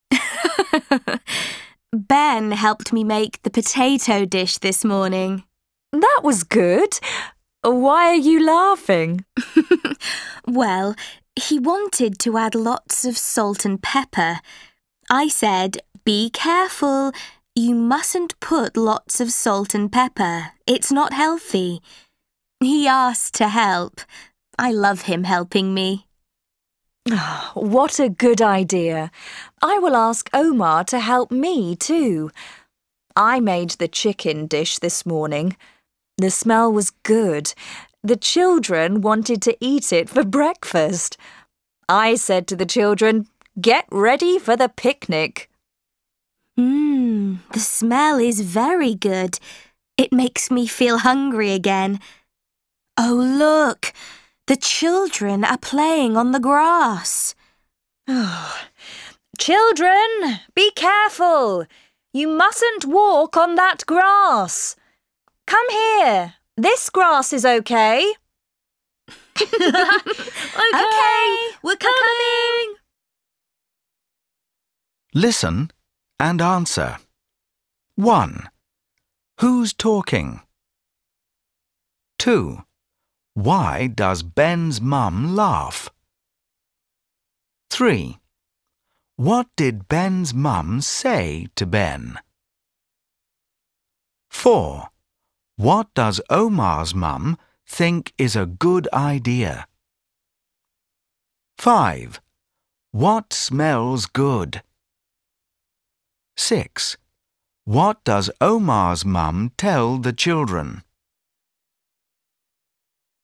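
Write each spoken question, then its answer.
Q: Why does Ben's mum laugh?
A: Because Ben wanted to add lots of salt and pepper

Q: What did Ben's mum say to Ben?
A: Be careful. You mustn't put lots of salt and pepper.

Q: What does Omar's mum think is a good idea?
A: Asking Omar to help her cook

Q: What smells good?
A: The chicken dish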